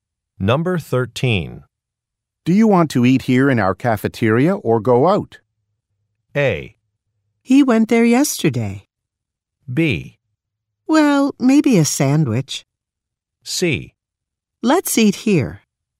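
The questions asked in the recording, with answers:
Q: Do you want to eat here in our cafeteria or go out?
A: C: Let's eat here.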